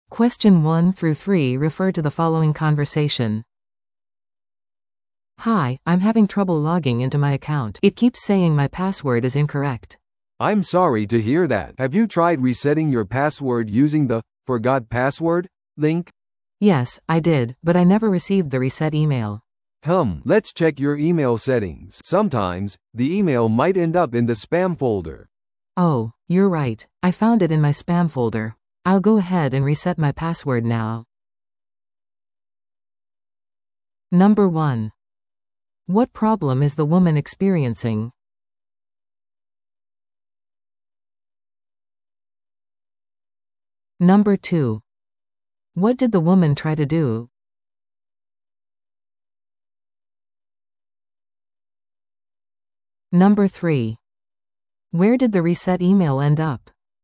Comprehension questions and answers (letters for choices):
Listen to the audio below and answer the questions.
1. What problem is the woman experiencing?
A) コンピュータの電源が入らない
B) アカウントにログインできない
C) パスワードを紛失した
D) メールアドレスを忘れた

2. What did the woman try to do?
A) テクニカルサポートに連絡する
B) パスワードをリセットする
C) メールアドレスを変更する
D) 新しいアカウントを作成する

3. Where did the reset email end up?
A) 受信トレイ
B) スパムフォルダー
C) ゴミ箱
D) 送信されていなかった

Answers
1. B
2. B
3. B

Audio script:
A: "Hi, I'm having trouble logging into my account. It keeps saying my password is incorrect."
B: "I'm sorry to hear that. Have you tried resetting your password using the 'Forgot Password' link?"
A: "Yes, I did, but I never received the reset email."
Let's check your email settings. Sometimes, the email might end up in the spam folder."
A: "Oh! You're right. I found it in my spam folder. I'll go ahead and reset my password now."